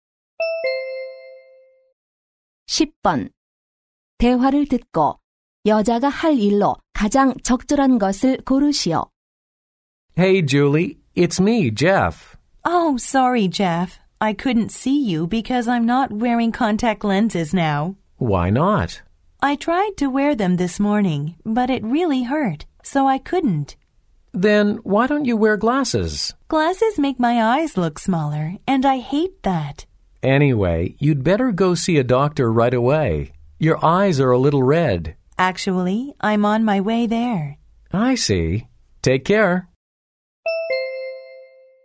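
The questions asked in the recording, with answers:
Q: 대화를 듣고 여자가 할 일로 가장 적절한 것을 고르시오.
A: 병원(안과)에 가기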